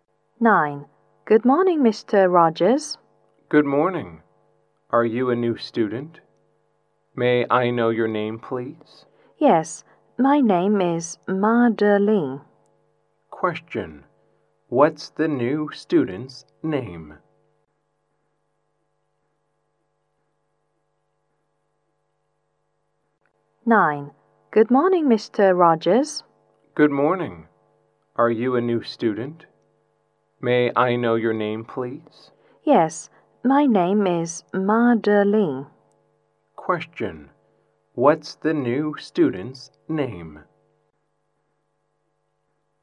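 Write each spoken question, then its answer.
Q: What's the new student's name?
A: Madeline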